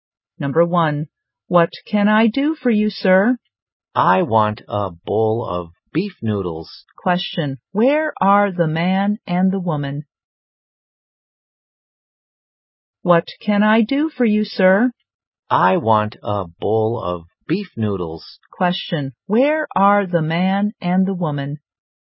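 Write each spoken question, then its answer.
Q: Question, where are the man and the woman?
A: In a restaurant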